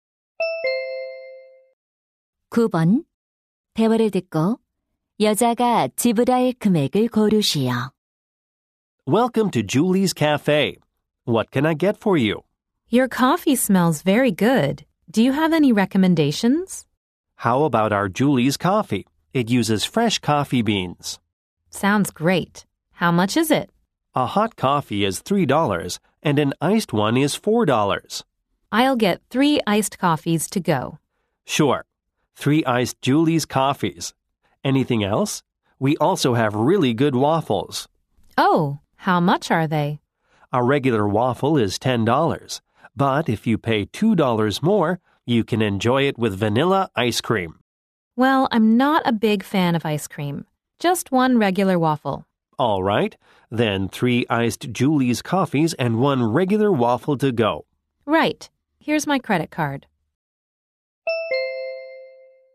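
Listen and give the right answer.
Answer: $22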